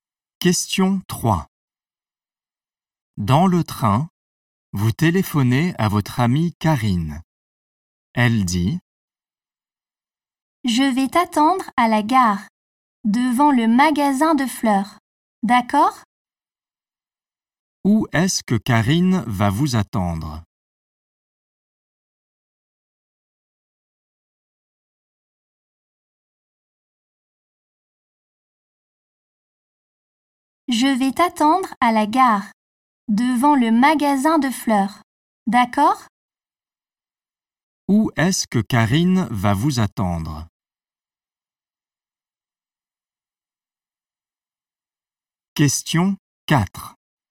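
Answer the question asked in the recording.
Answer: Devant le magasin de fleurs, à la gare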